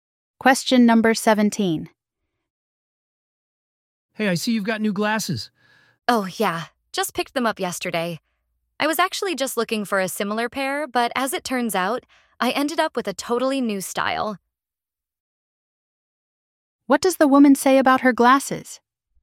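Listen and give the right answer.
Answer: She ended up with a totally new style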